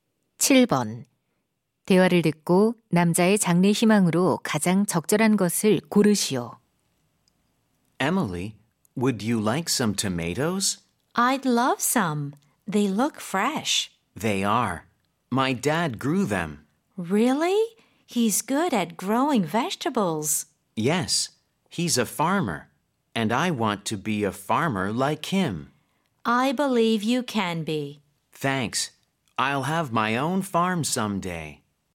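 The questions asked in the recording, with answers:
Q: 대화를 듣고 남자의 장래 희망으로 가장 적절한 것을 고르시오.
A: 농부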